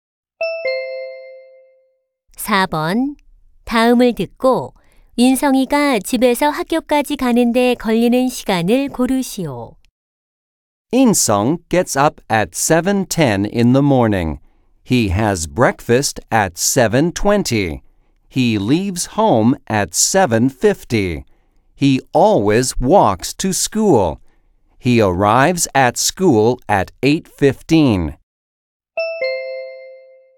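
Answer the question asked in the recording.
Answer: 25분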